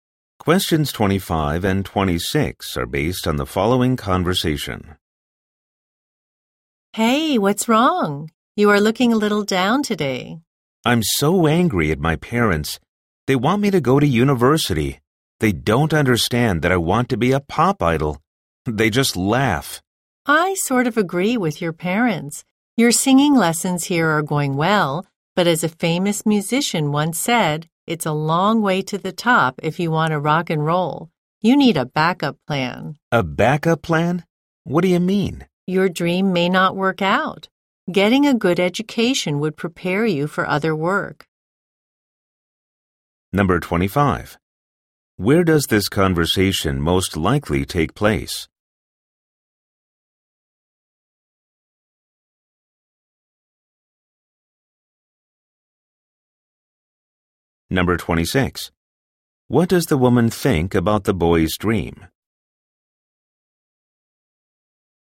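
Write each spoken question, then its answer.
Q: Where does this conversation most likely take place?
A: At a singing school

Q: What does the woman think about the boy's dream?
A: It may not work out, so he needs a backup plan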